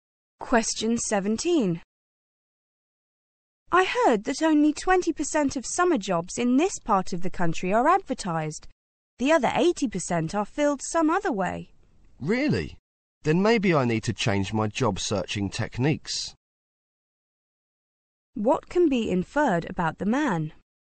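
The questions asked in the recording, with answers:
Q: What can be inferred about the man?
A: He may need to change the way he looks for a summer job.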